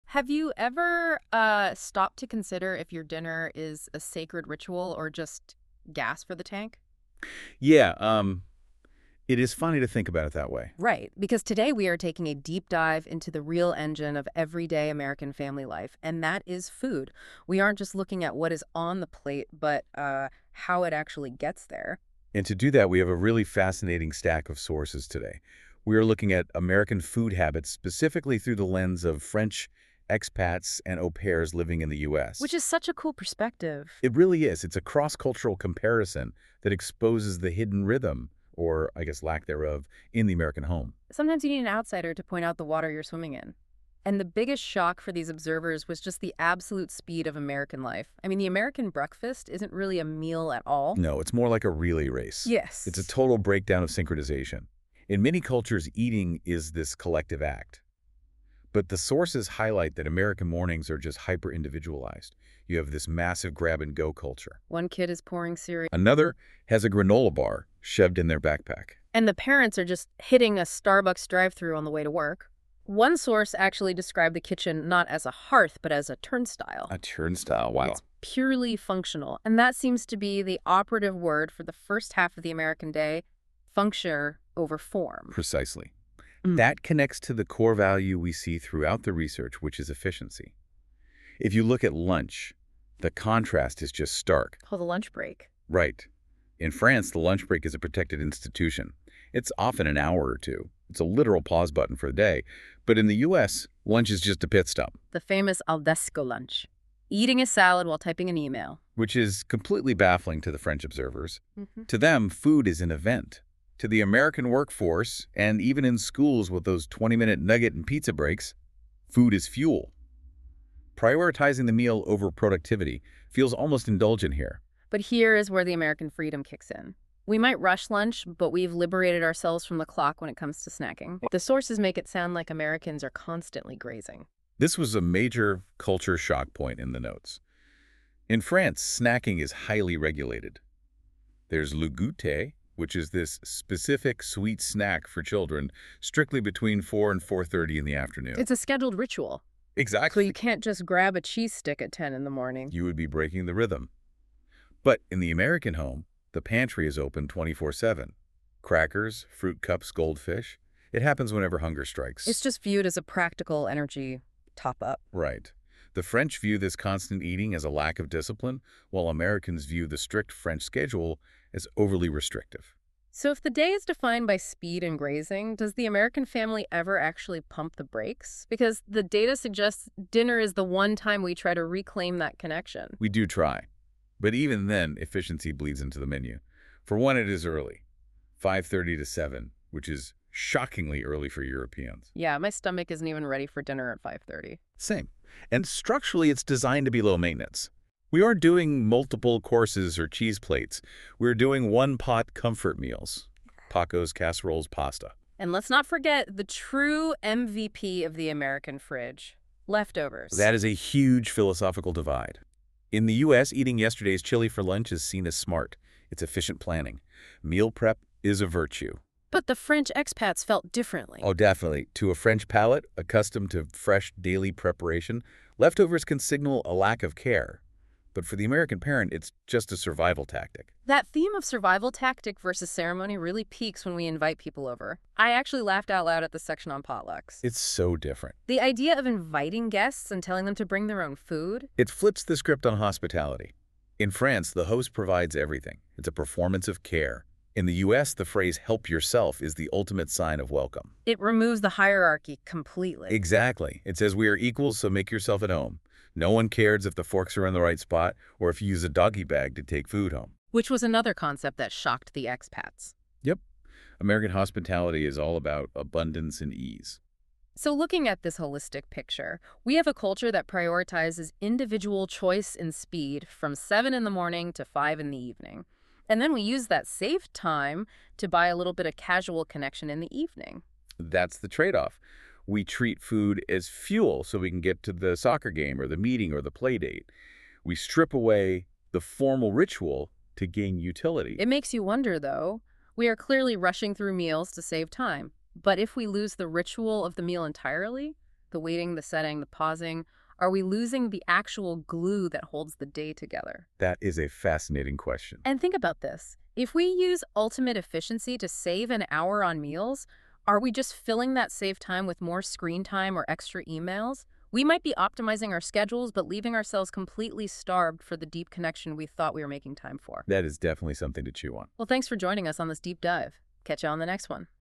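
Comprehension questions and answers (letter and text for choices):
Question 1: How is breakfast often described in the U.S.?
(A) Long and formal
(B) Fast and practical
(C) Always homemade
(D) Always shared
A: (B) Fast and practical

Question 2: What might kids eat for breakfast?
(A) Soup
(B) Salad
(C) Cereal or a granola bar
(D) Steak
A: (C) Cereal or a granola bar

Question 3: What is common about American breakfasts?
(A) Everyone eats the same thing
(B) Families always sit together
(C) People often eat different foods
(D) It is always cooked at home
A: (C) People often eat different foods

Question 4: How long is a typical school lunch?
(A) 1 hour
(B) 45 minutes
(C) 20–30 minutes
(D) 2 hours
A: (C) 20–30 minutes

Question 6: What is the most important shared meal in the U.S.?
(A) Breakfast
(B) Lunch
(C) Dinner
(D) Snack time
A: (C) Dinner

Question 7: When do Americans often eat dinner?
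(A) 9:00 p.m.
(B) 8:00 p.m.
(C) 7:30 p.m.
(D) 5:30–6:00 p.m.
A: (D) 5:30–6:00 p.m.

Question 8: What is true about snacks in the U.S.?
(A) They are rare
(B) Only adults snack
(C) Snacking is part of daily life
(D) Snacks are always unhealthy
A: (C) Snacking is part of daily life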